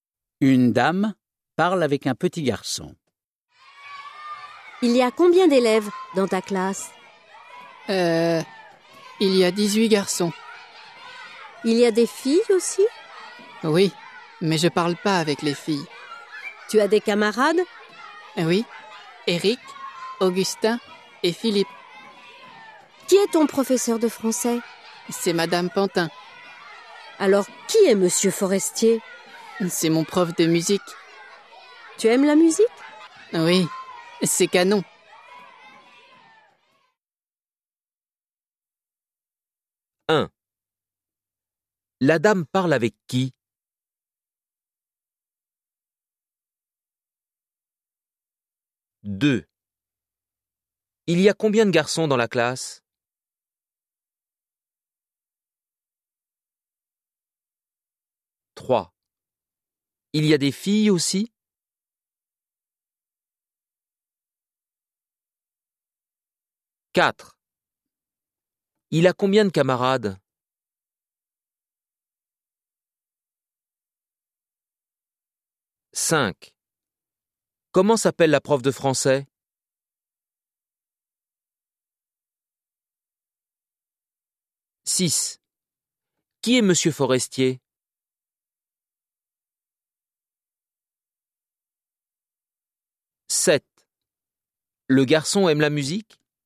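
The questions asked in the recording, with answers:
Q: La dame parle avec qui ?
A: Avec un petit garçon

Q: Il y a combien de garçons dans la classe ?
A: 18 garçons

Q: Il y a des filles aussi ?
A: Oui

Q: Il a combien de camarades ?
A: Trois (Eric, Augustin et Philippe)

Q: Comment s'appelle la prof de français ?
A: Madame Pantin

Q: Qui est Monsieur Forestier ?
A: Le prof de musique

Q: Le garçon aime la musique ?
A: Oui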